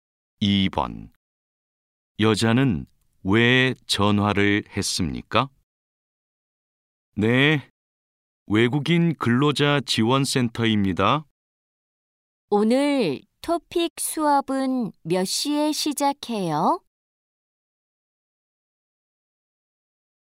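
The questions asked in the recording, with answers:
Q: 여자는 왜 전화를 했습니까?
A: 토픽 수업 시작 시간을 물어보려고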